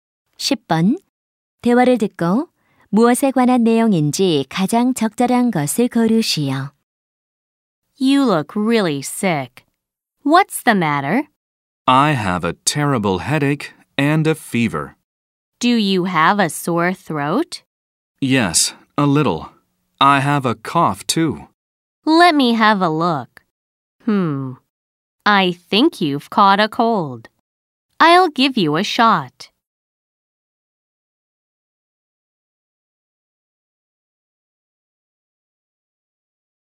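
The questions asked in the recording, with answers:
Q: 대화를 듣고 무엇에 관한 내용인지 가장 적절한 것을 고르시오.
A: 감기 진료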